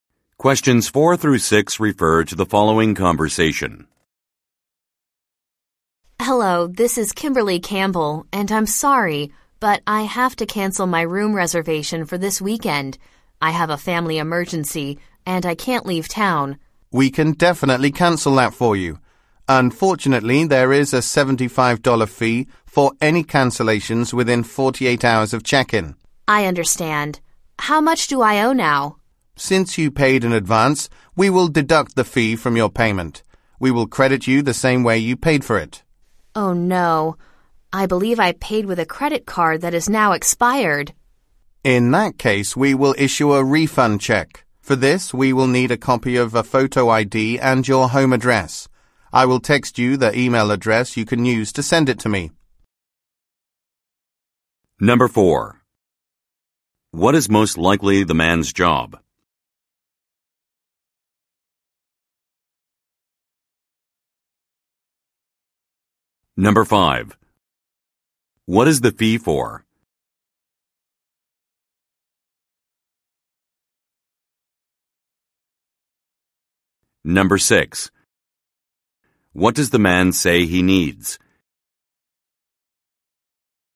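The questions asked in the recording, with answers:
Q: What is most likely the man's job?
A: Hotel reservations clerk

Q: What is the fee for?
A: Cancelling within 48 hours of check-in

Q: What does the man say he needs?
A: A copy of a photo ID and her home address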